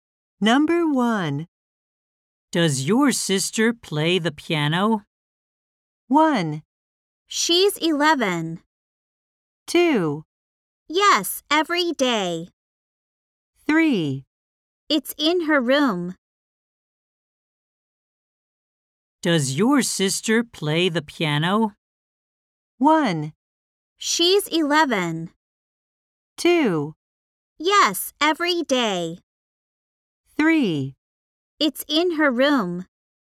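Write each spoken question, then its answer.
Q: Does your sister play the piano?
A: 2: Yes, every day.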